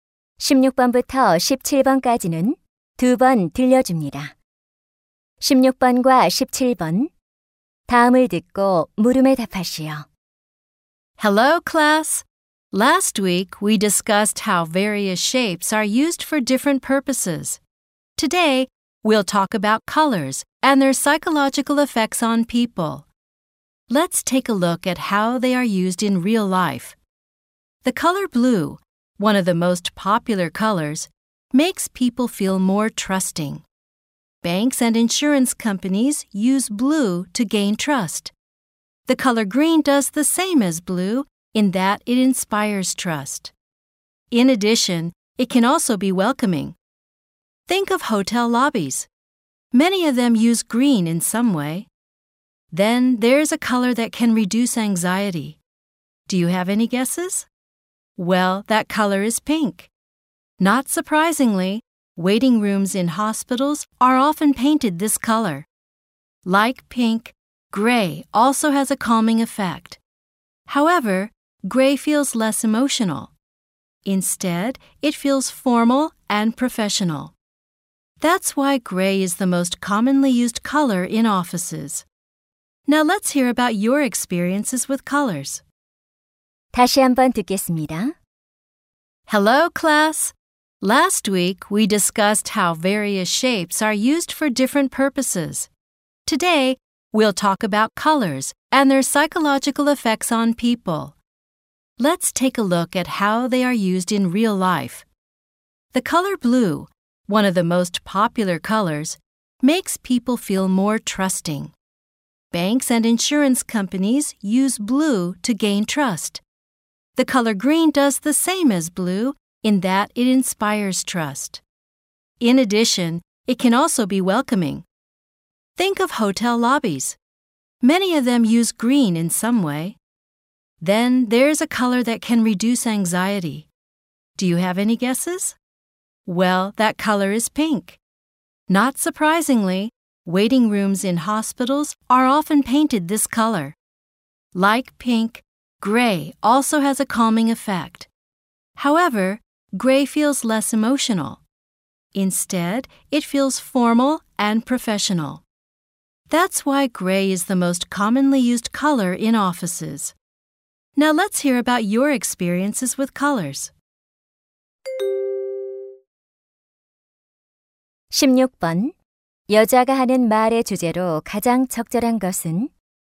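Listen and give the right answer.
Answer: 색이 사람에게 미치는 심리적 효과와 그 활용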